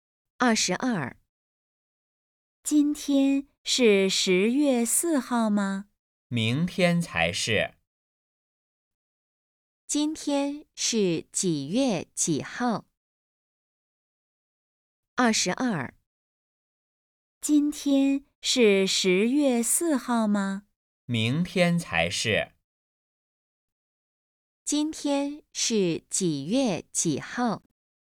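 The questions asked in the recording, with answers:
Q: 今天是几月几号?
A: 十月三号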